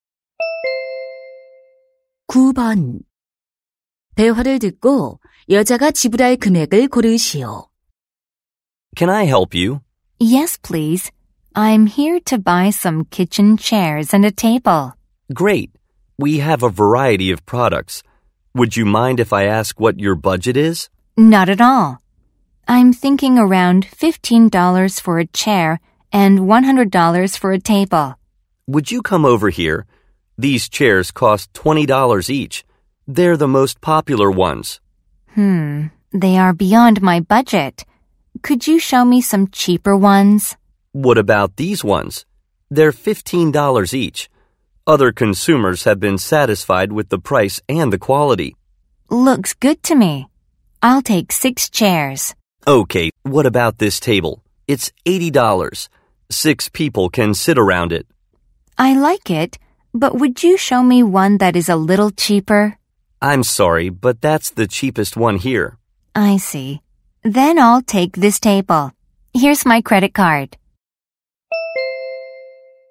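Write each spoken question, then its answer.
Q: 대화를 듣고 여자가 지불할 금액을 고르시오.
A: $170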